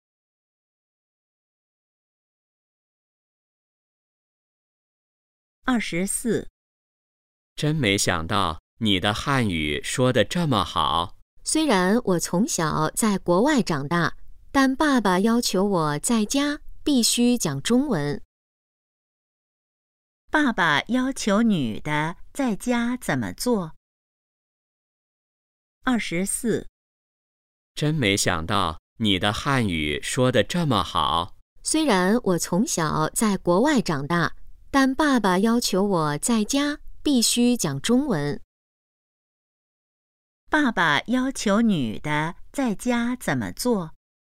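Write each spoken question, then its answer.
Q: 爸爸要求女的在家怎么做?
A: 讲中文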